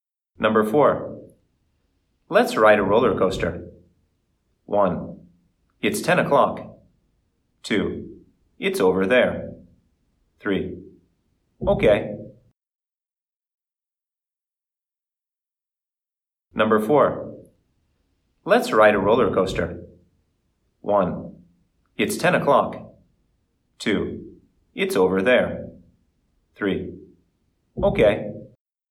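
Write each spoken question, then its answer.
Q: Let's ride a roller coaster.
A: 3: Okay.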